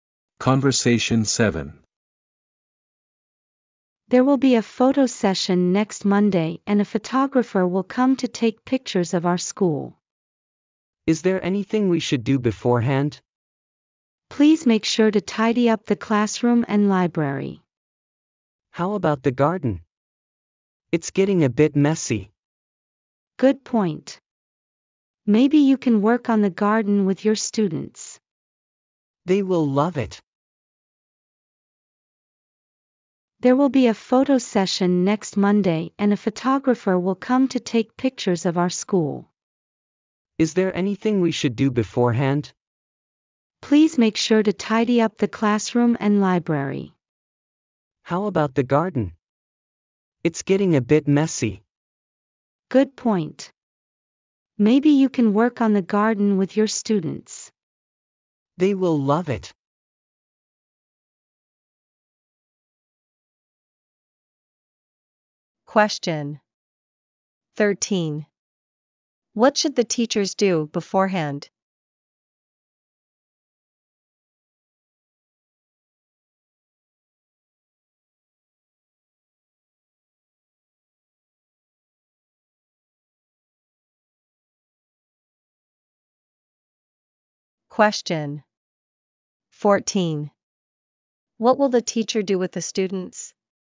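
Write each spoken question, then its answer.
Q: What should the teachers do beforehand?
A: Tidy up the classroom and library

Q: What will the teacher do with the students?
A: Work on the garden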